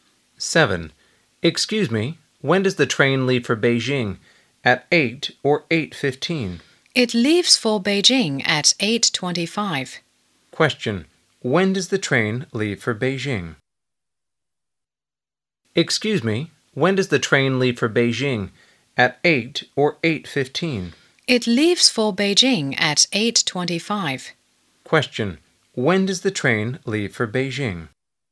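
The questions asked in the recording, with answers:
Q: Question. When does the train leave for Beijing?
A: At 8:25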